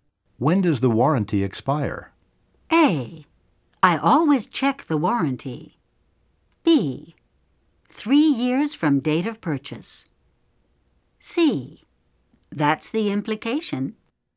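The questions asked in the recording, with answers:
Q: When does the warranty expire?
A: B: 3 years from date of purchase.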